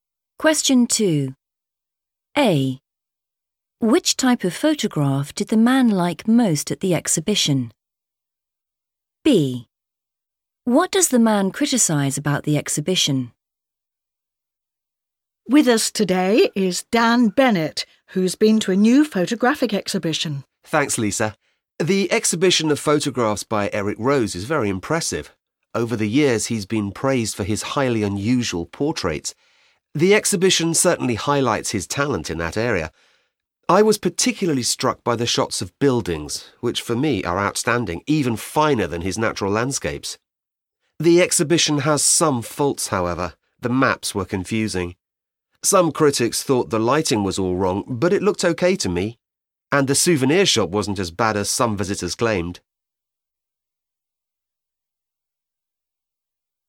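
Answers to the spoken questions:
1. buildings
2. the maps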